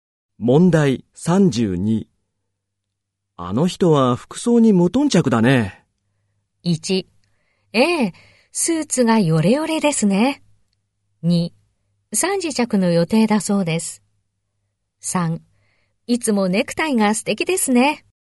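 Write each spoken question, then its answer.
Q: あの人は服装に無頓着だね。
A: 1: ええ、スーツがヨレヨレですね。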